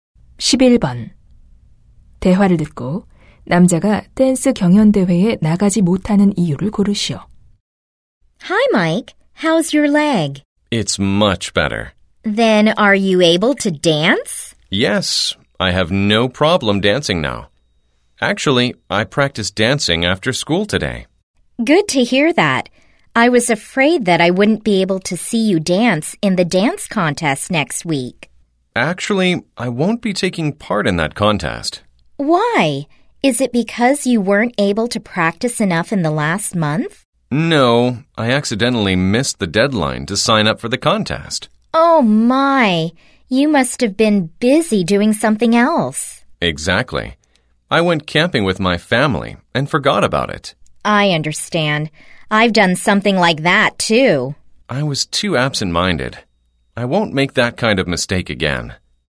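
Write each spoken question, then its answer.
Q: 대화를 듣고 남자가 댄스 경연 대회에 나가지 못하는 이유를 고르시오.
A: 신청 마감일을 놓쳐서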